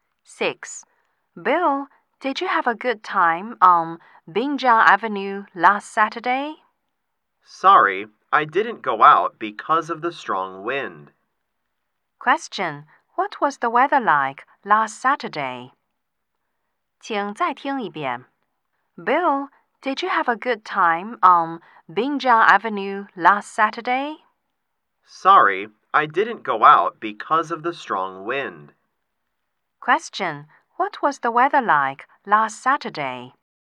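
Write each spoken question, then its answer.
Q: what was the weather like last Saturday?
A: It was windy.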